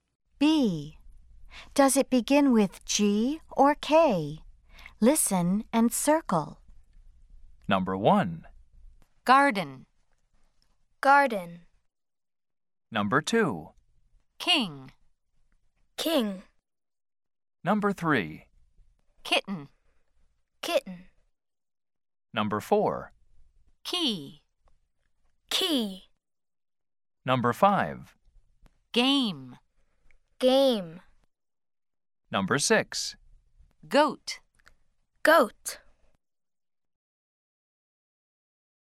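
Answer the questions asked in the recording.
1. G (garden)
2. K (king)
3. K (kitten)
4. K (key)
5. G (game)
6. G (goat)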